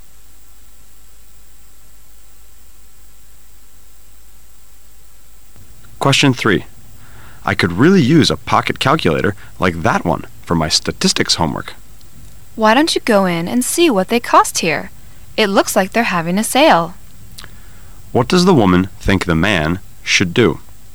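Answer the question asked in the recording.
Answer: Go into the shop and ask what the calculators cost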